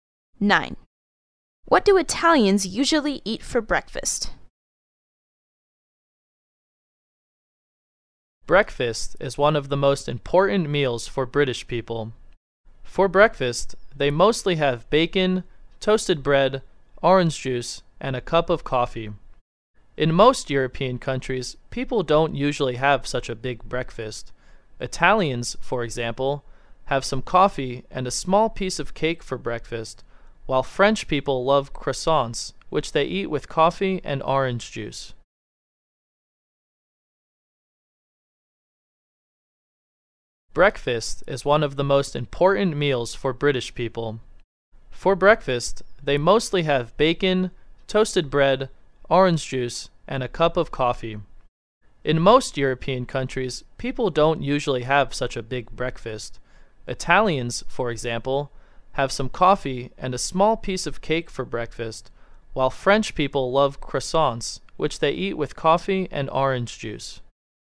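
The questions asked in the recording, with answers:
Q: What do Italians usually eat for breakfast?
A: Coffee and a small piece of cake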